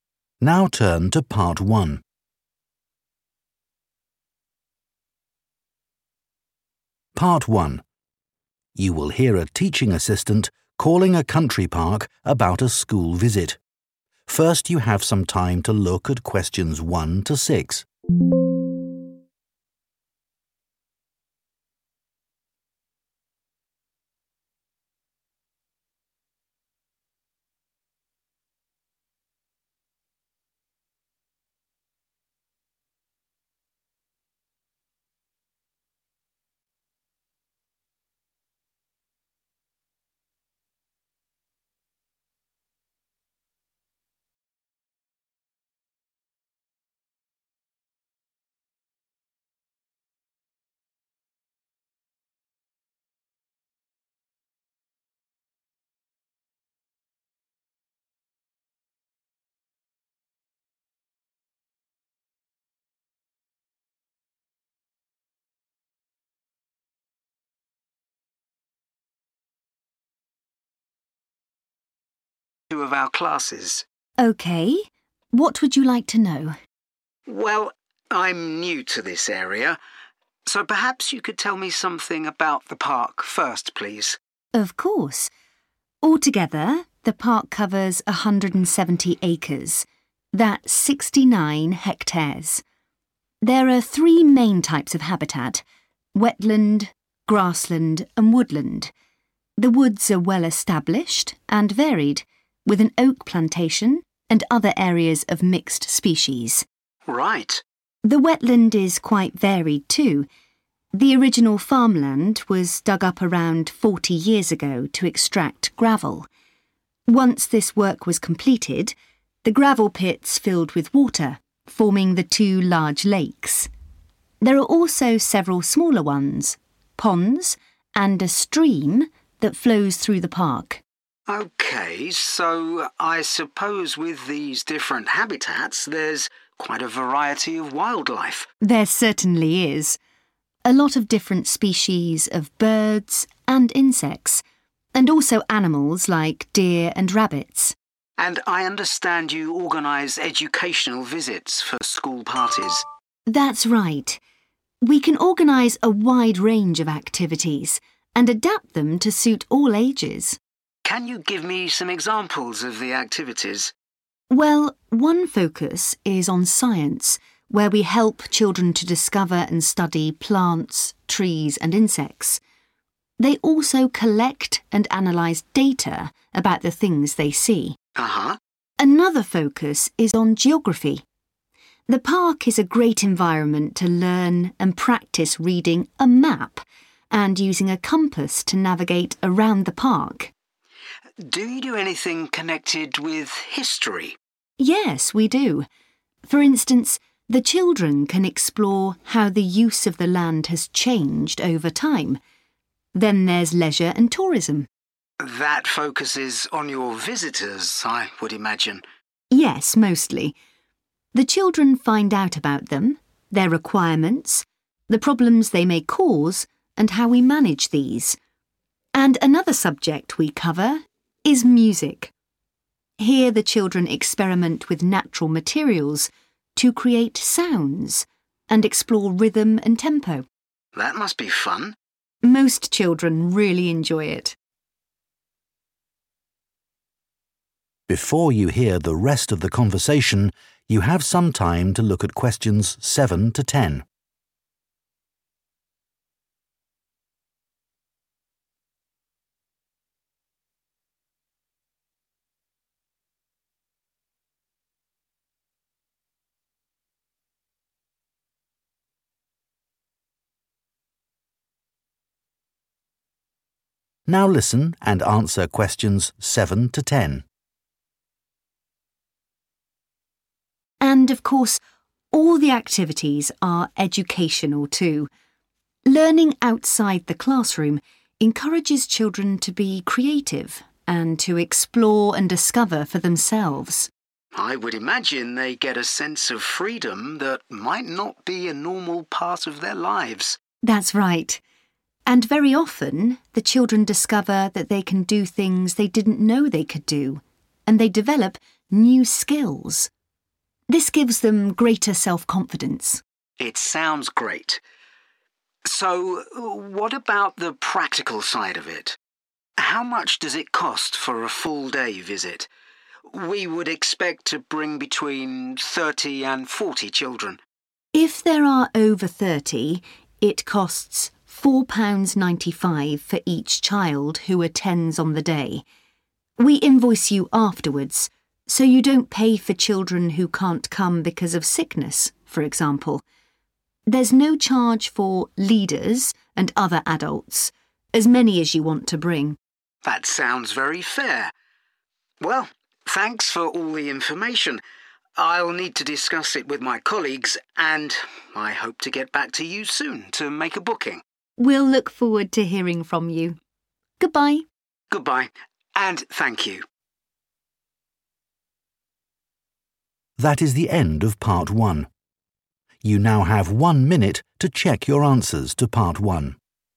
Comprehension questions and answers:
Complete the notes below.Write ONE WORD AND/OR A NUMBER for each answer.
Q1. Area: 1 hectares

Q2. Wetland: lakes, ponds and a 2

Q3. Science: Children look at 3 about plants, etc.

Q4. Geography: includes learning to use a 4 and compass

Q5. Leisure and tourism: mostly concentrates on the park's 5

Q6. Music: Children make 6 with natural materials, and experiment with rhythm and speed.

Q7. They give children a feeling of 7 that they may not have elsewhere.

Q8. Children learn new 8 and gain self-confidence.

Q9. Cost per child: 9 £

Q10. Adults, such as 10 , free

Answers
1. sixty-nine
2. stream
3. data
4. map
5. visitors
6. sounds
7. freedom
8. skills
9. 4.95
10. leaders